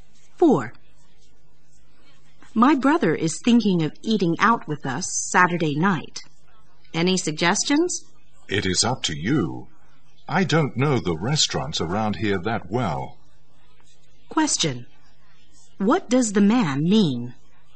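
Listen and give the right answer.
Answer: He leaves the choice of restaurant to the woman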